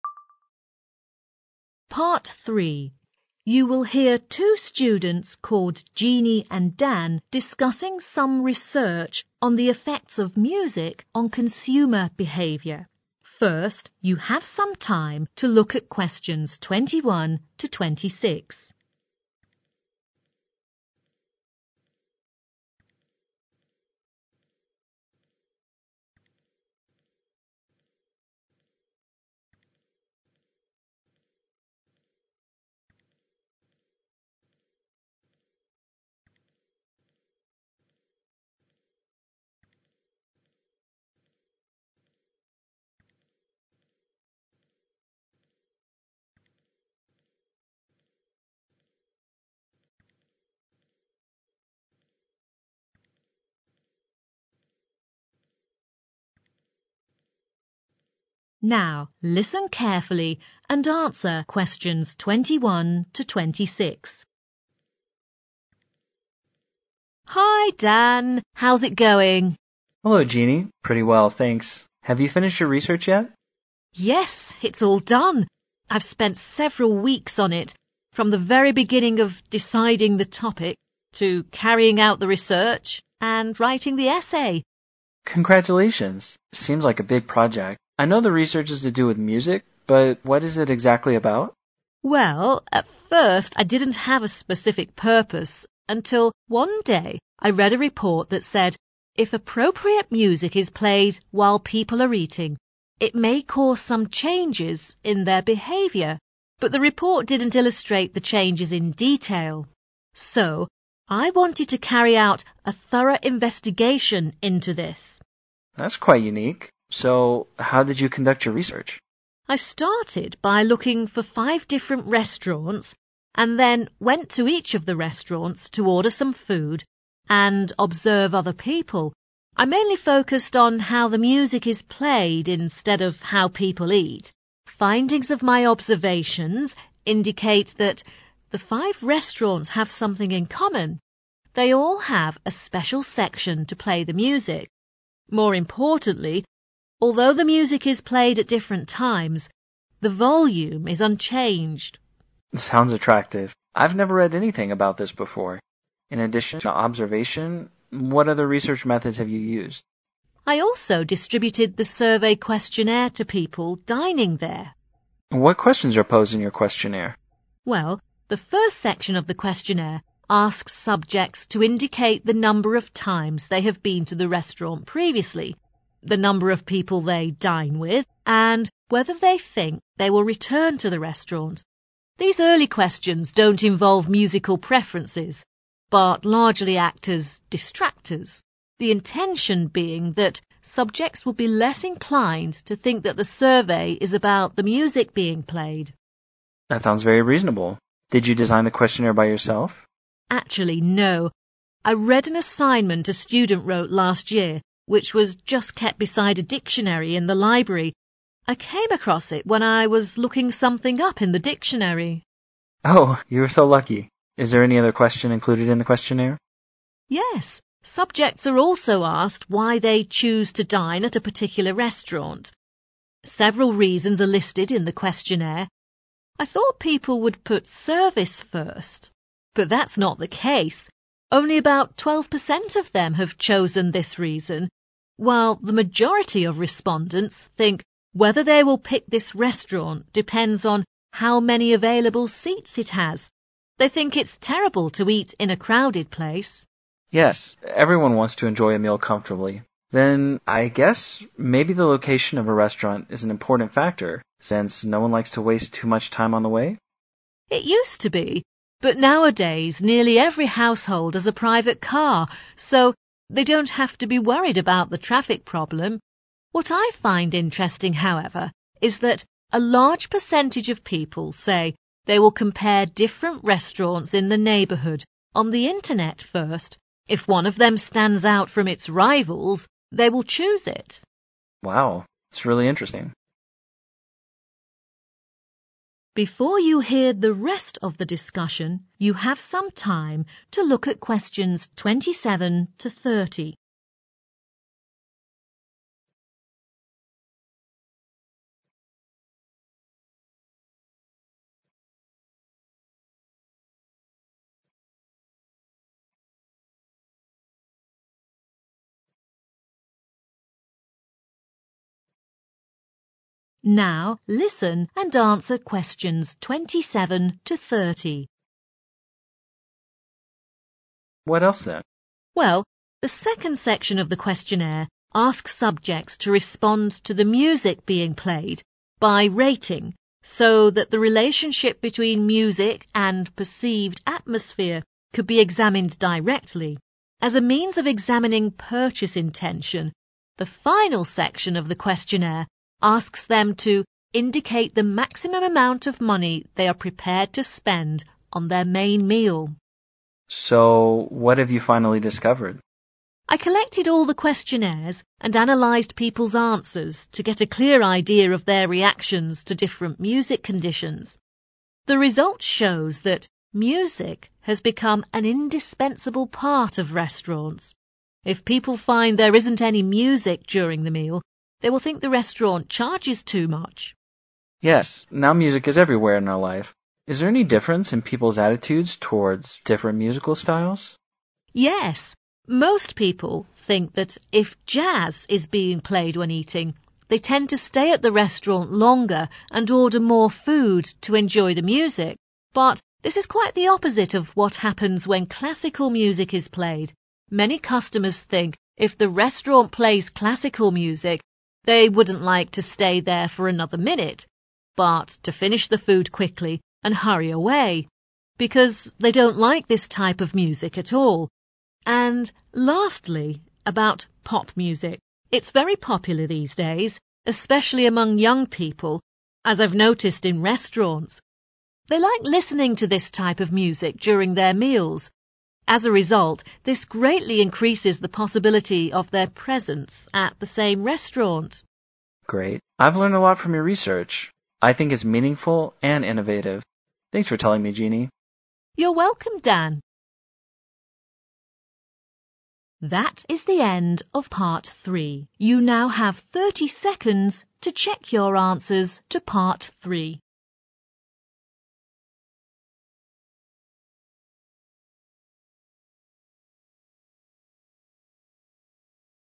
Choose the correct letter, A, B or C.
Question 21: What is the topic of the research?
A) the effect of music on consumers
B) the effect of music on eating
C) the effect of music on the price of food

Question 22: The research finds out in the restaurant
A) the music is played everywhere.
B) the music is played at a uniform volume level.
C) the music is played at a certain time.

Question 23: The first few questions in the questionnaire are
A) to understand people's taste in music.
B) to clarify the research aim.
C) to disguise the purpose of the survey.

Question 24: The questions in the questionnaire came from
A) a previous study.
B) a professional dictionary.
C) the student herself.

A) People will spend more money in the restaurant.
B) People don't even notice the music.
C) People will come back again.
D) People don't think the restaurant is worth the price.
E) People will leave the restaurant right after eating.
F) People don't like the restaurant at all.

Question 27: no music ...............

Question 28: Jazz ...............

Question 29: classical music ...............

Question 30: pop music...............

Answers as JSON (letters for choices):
{"21": "A", "22": "B", "23": "C", "24": "A", "27": "D", "28": "A", "29": "E", "30": "C"}